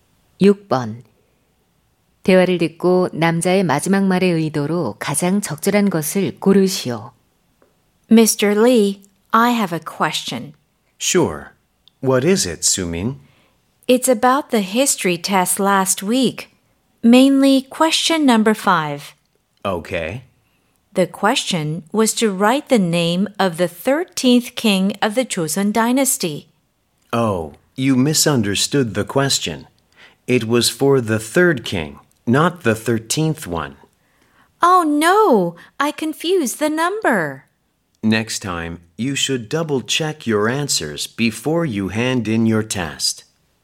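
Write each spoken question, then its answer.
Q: 대화를 듣고 남자의 마지막 말의 의도로 가장 적절한 것을 고르시오.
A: 충고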